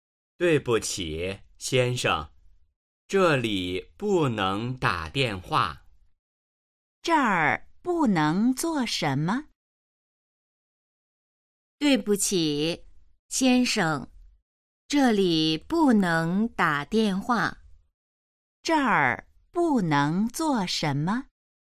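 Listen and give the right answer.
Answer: 打电话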